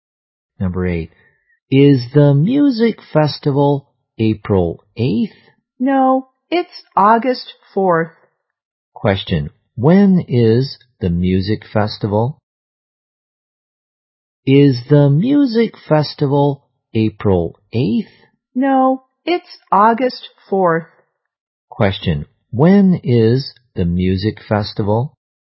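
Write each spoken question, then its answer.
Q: when is the music festival?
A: August 4th.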